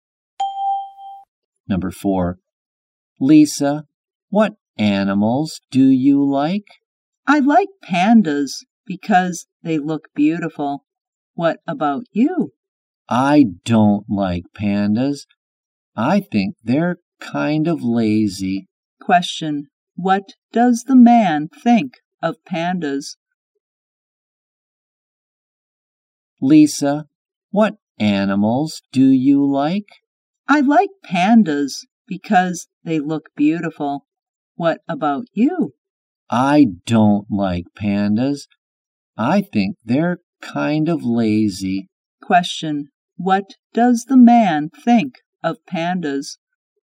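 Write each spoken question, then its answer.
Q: What does the man think of pandas?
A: They're kind of lazy.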